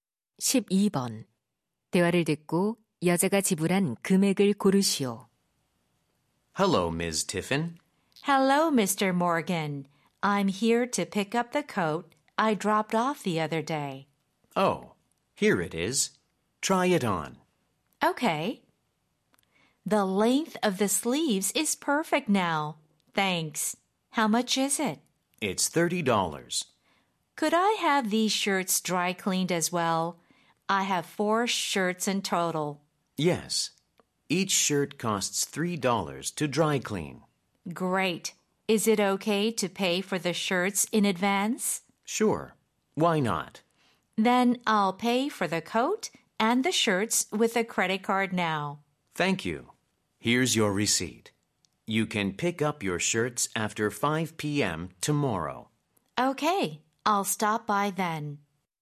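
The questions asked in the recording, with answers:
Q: 대화를 듣고 여자가 지불한 금액을 고르시오.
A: $42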